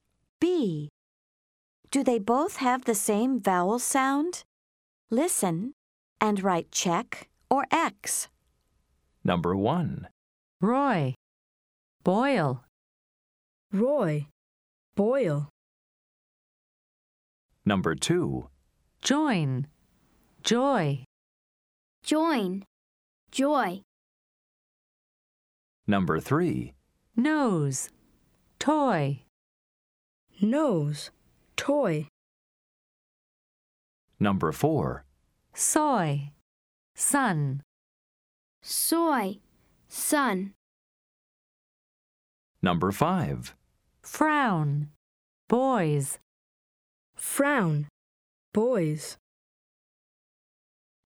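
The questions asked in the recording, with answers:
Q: Do they both have the same vowel sound?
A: Yes (check): Roy, Boyle

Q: Do they both have the same vowel sound?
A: Yes (check): Join, Joy

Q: Do they both have the same vowel sound?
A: No (X): Nose, Toy

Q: Do they both have the same vowel sound?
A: No (X): Soy, Sun

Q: Do they both have the same vowel sound?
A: No (X): Frown, Boys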